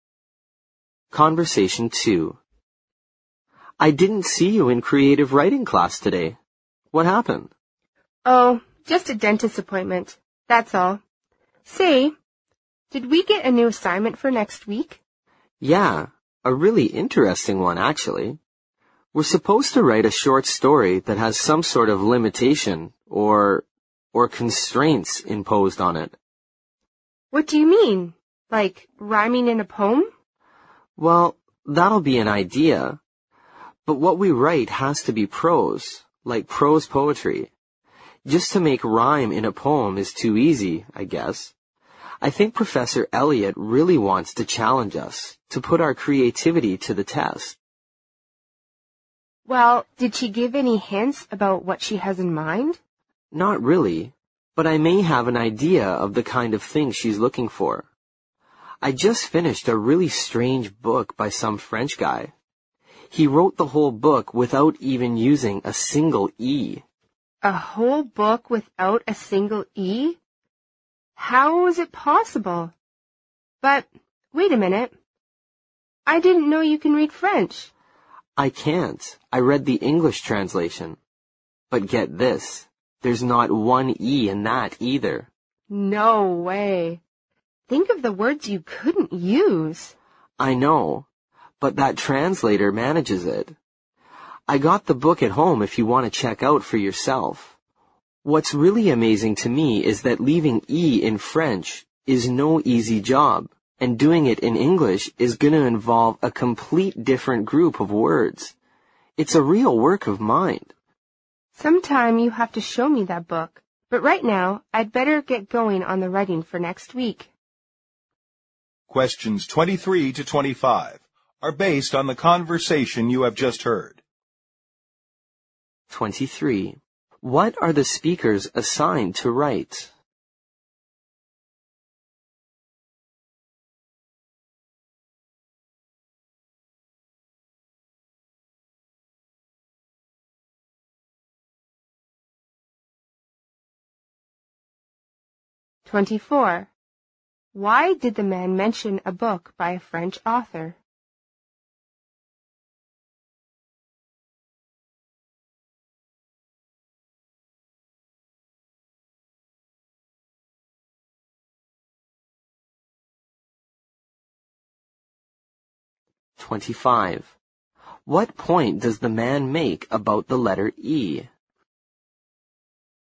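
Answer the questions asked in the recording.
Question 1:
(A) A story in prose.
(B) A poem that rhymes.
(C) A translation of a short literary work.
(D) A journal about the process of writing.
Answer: (A) A story in prose.
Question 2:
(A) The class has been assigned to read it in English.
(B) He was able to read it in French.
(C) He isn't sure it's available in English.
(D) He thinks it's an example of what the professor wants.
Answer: (D) He thinks it's an example of what the professor wants.
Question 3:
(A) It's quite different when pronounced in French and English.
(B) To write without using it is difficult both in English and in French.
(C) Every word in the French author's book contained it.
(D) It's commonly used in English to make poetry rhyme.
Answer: (B) To write without using it is difficult both in English and in French.

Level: 六级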